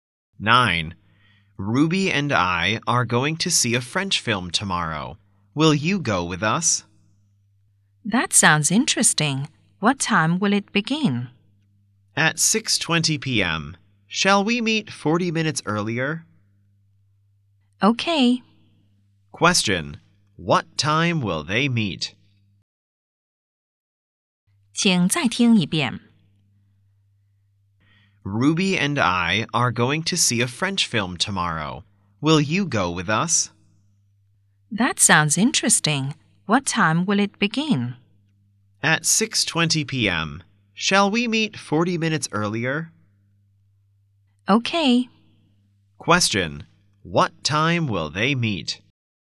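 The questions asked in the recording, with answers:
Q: What time will they meet?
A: At 5:40 p.m.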